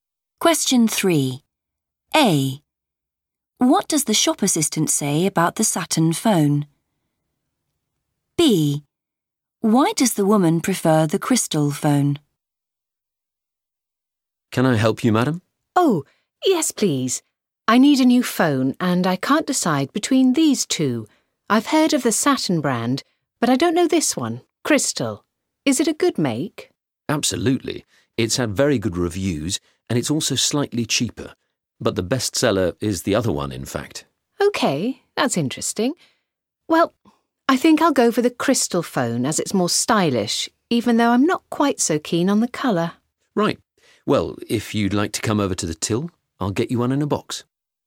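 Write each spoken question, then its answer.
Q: What does the shop assistant say about the Saturn phone?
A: it is the best seller

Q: Why does the woman prefer the crystal phone?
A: it is more stylish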